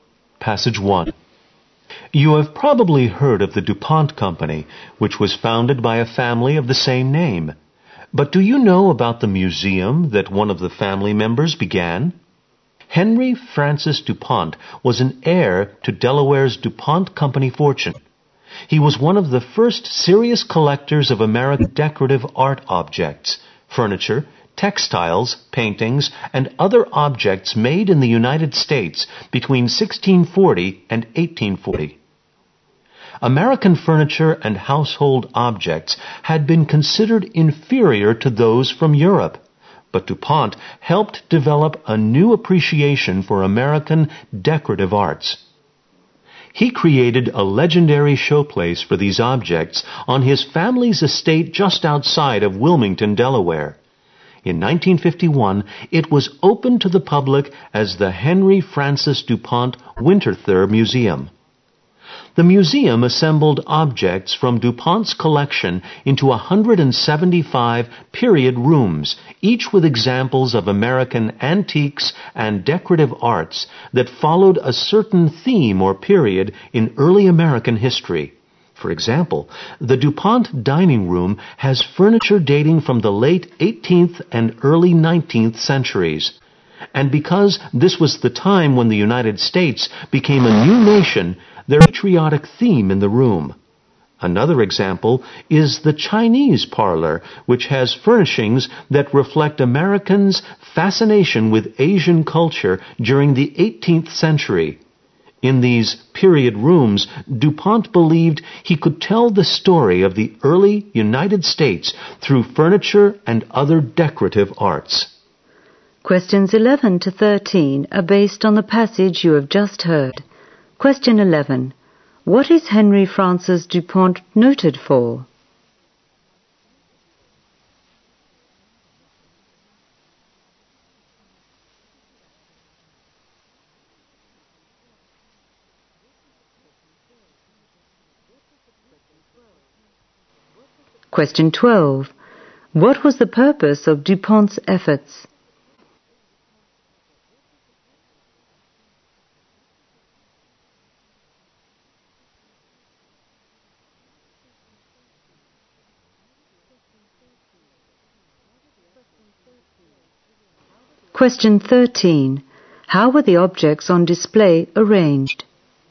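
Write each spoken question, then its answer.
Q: What is Henry Francis DuPont noted for?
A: Collecting American decorative art objects

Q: What was the purpose of DuPont's efforts?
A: To tell the story of the early US through decorative arts

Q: How were the objects on display arranged?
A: In 175 period rooms by theme or period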